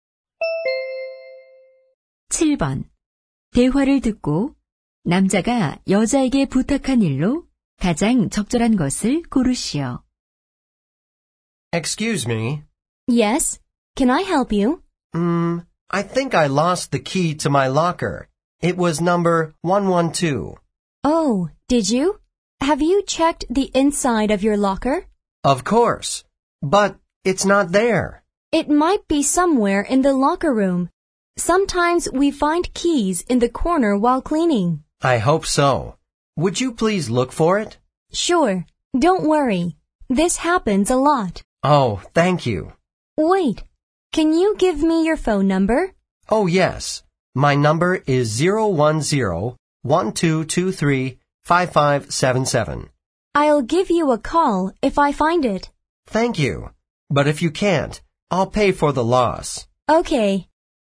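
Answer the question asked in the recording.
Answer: 잃어버린 사물함 열쇠 찾아 주기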